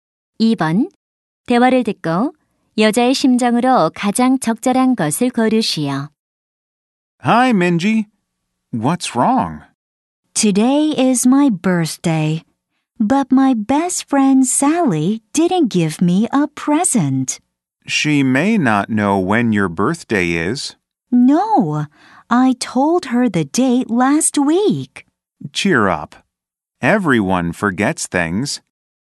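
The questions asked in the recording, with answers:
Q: 대화를 듣고 여자의 심정으로 가장 적절한 것을 고르시오.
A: 실망한, 서운한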